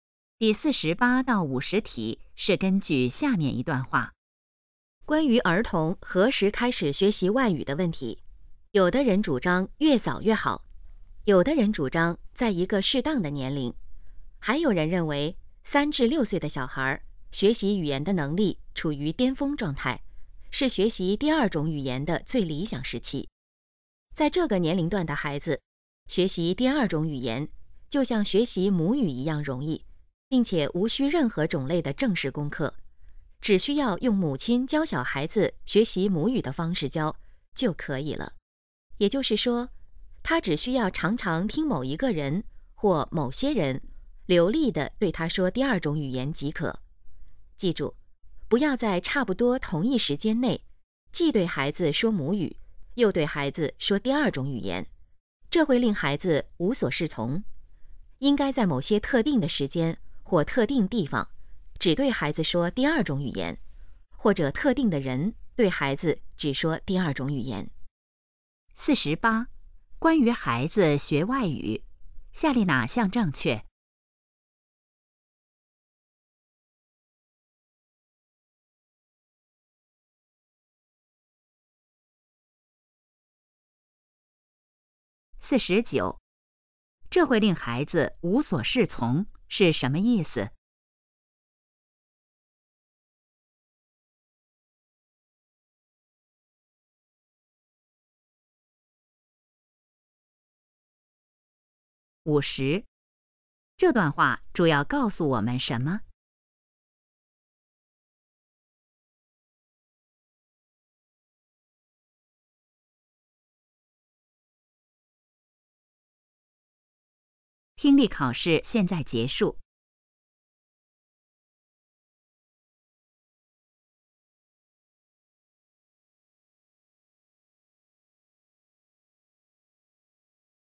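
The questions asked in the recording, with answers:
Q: 这会令孩子无所适从是什么意思?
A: 孩子不知道该怎么办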